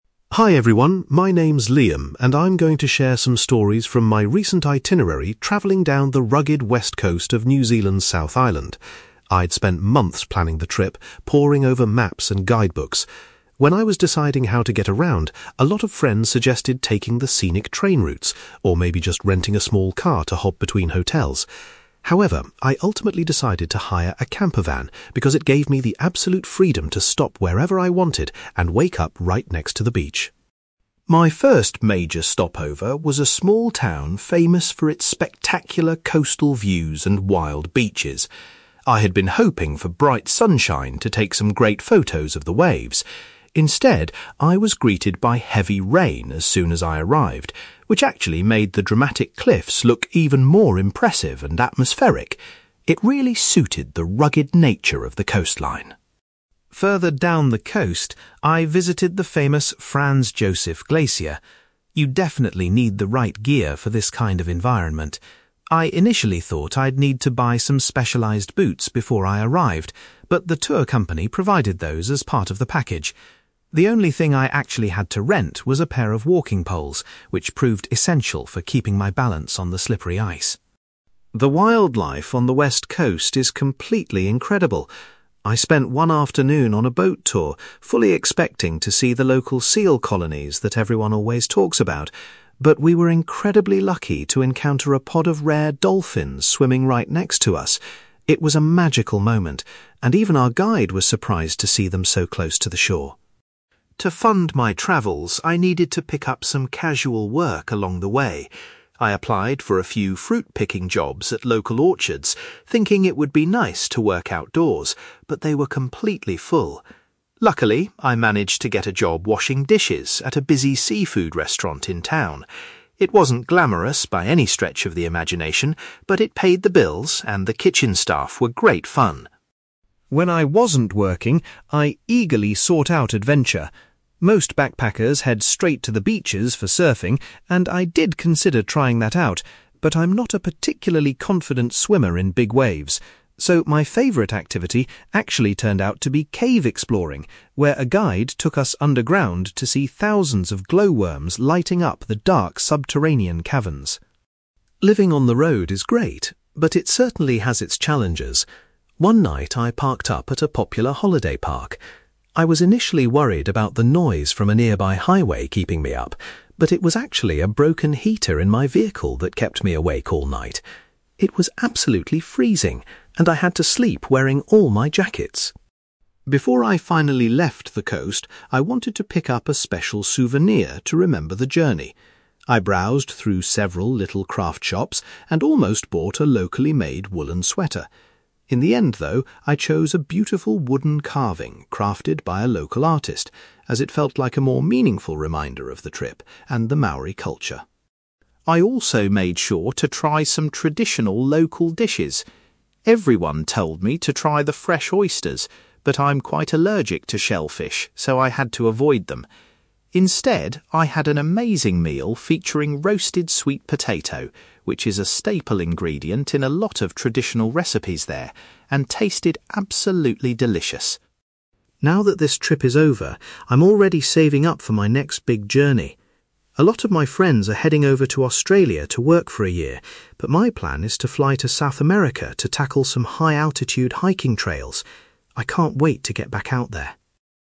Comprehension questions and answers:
You will hear a young man called Liam talking about his travel experiences along the west coast of New Zealand's South Island. For questions 9-18, complete the sentences with a word or short phrase.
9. Liam opted to travel in a (9)........................... rather than using a train or a car.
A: campervan

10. At his first destination, Liam experienced (10)........................... instead of the sunny weather he expected.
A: heavy rain

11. Liam had to hire some (11)........................... to help him stay steady on the glacier.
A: walking poles

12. On a boat trip, Liam was thrilled to spot some (12)........................... rather than the usual seals.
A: rare dolphins

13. To support his travels, Liam spent some time (13)........................... in a local restaurant.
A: washing dishes

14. Liam says that (14)........................... was his preferred adventurous activity during the trip.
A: cave exploring

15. Liam's sleep at a holiday park was ruined by a (15)........................... in his vehicle.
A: broken heater

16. Liam purchased a (16)........................... as a memorable item to take home.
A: wooden carving

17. Because of an allergy, Liam ate a meal made with (17)........................... rather than local seafood.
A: sweet potato

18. Liam is currently preparing for a hiking adventure in (18)........................... .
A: South America

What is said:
Liam: Hi everyone, my name is Liam, and I'm going to share some stories from my recent itinerary travelling down the rugged west coast of New Zealand's South Island. I'd spent months planning the trip, pouring over maps and guidebooks. When I was deciding how to get around, a lot of friends suggested taking the scenic train routes, or maybe just renting a small car to hop between hotels. However, I ultimately decided to hire a campervan because it gave me the absolute freedom to stop wherever I wanted and wake up right next to the beach.
My first major stopover was a small town famous for its spectacular coastal views and wild beaches. I had been hoping for bright sunshine to take some great photos of the waves. Instead, I was greeted by heavy rain as soon as I arrived, which actually made the dramatic cliffs look even more impressive and atmospheric. It really suited the rugged nature of the coastline!
Further down the coast, I visited the famous Franz Josef Glacier. You definitely need the right gear for this kind of environment. I initially thought I'd need to buy some specialized boots before I arrived, but the tour company provided those as part of the package. The only thing I actually had to rent was a pair of walking poles, which proved essential for keeping my balance on the slippery ice.
The wildlife on the west coast is completely incredible. I spent one afternoon on a boat tour, fully expecting to see the local seal colonies that everyone always talks about. But we were incredibly lucky to encounter a pod of rare dolphins swimming right next to us. It was a magical moment, and even our guide was surprised to see them so close to the shore.
To fund my travels, I needed to pick up some casual work along the way. I applied for a few fruit picking jobs at local orchards, thinking it would be nice to work outdoors, but they were completely full. Luckily, I managed to get a job washing dishes at a busy seafood restaurant in town. It wasn't glamorous by any stretch of the imagination, but it paid the bills and the kitchen staff were great fun!
When I wasn't working, I eagerly sought out adventure. Most backpackers head straight to the beaches for surfing, and I did consider trying that out, but I'm not a particularly confident swimmer in big waves. So, my favourite activity actually turned out to be cave exploring, where a guide took us underground to see thousands of glowworms lighting up the dark subterranean caverns.
Living on the road is great, but it certainly has its challenges. One night, I parked up at a popular holiday park. I was initially worried about the noise from a nearby highway keeping me up, but it was actually a broken heater in my vehicle that kept me awake all night. It was absolutely freezing, and I had to sleep wearing all my jackets!
Before I finally left the coast, I wanted to pick up a special souvenir to remember the journey. I browsed through several little craft shops and almost bought a locally made woollen sweater. In the end, though, I chose a beautiful wooden carving crafted by a local artist, as it felt like a more meaningful reminder of the trip and the Maori culture.
I also made sure to try some traditional local dishes. Everyone told me to try the fresh oysters, but I'm quite allergic to shellfish so I had to avoid them. Instead, I had an amazing meal featuring roasted sweet potato, which is a staple ingredient in a lot of traditional recipes there and tasted absolutely delicious.
Now that this trip is over, I'm already saving up for my next big journey. A lot of my friends are heading over to Australia to work for a year, but my plan is to fly to South America to tackle some high-altitude hiking trails. I can't wait to get back out there!

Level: B2